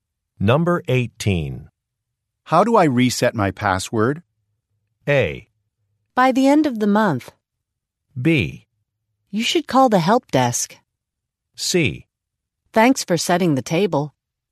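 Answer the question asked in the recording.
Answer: B: You should call the help desk.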